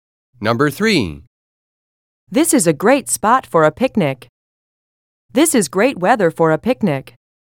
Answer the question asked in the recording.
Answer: Different is the correct answer.